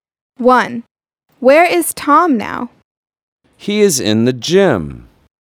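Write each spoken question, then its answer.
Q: Where is Tom now?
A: In the gym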